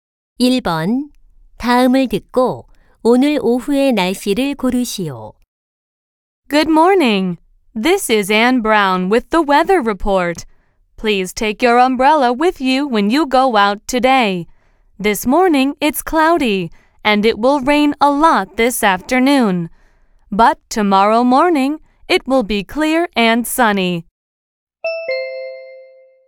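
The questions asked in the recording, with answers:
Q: 다음을 듣고 오늘 오후의 날씨를 고르시오.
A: 비가 많이 옴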